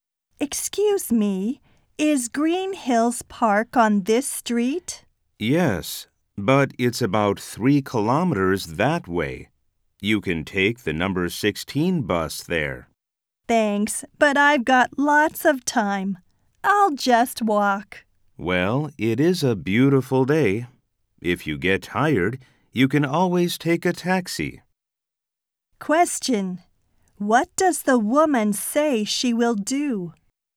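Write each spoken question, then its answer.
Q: What does the woman say she will do?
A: Walk to the park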